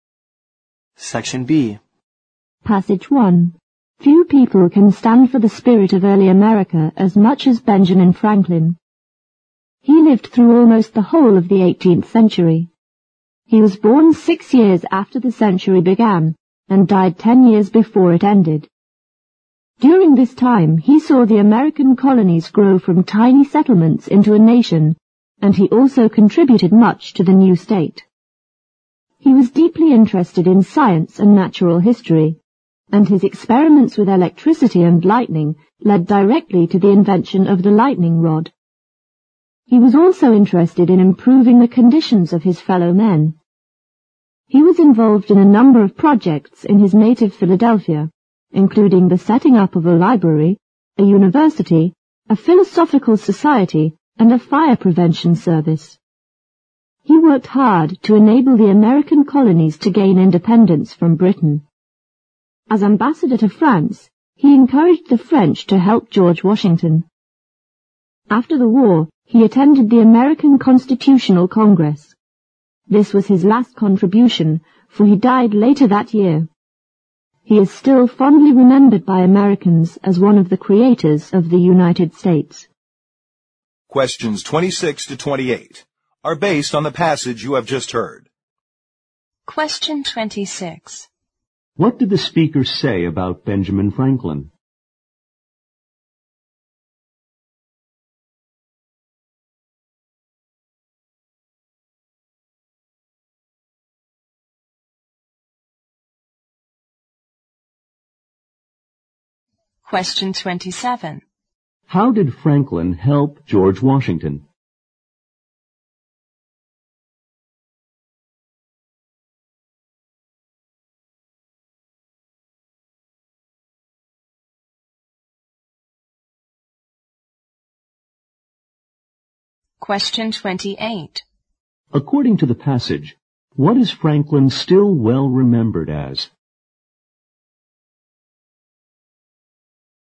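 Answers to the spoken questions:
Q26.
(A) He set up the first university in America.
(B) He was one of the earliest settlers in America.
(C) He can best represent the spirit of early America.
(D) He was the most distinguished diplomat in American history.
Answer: (C) He can best represent the spirit of early America.
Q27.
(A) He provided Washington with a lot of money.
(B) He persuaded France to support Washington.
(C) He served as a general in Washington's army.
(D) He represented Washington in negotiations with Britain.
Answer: (B) He persuaded France to support Washington.
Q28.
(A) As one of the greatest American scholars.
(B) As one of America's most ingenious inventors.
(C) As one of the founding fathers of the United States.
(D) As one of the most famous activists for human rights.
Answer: (C) As one of the founding fathers of the United States.

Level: 六级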